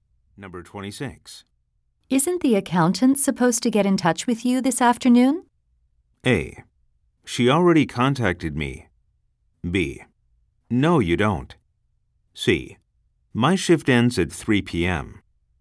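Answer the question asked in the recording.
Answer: A: She already contacted me.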